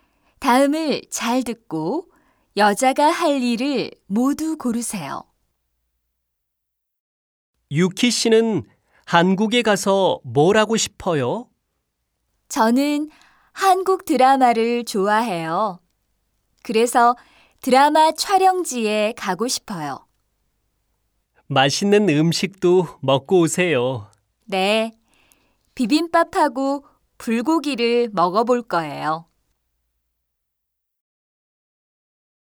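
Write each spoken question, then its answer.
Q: 다음을 잘 듣고 여자가 할 일을 모두 고르세요.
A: 드라마 촬영지에 가기, 비빔밥하고 불고기 먹기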